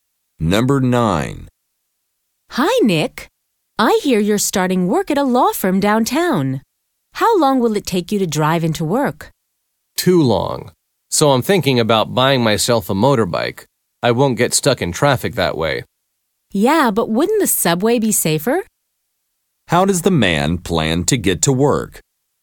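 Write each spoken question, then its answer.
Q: How does the man plan to get to work?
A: By motorbike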